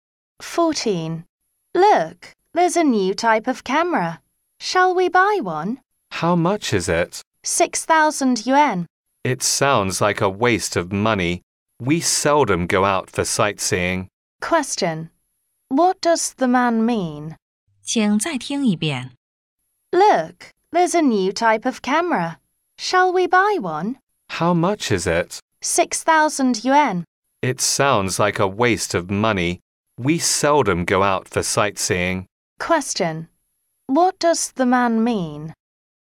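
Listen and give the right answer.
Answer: He doesn't want to buy the camera; it's a waste of money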